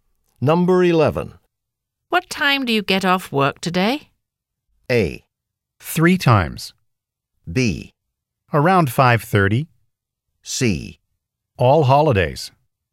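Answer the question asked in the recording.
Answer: B: Around 5:30.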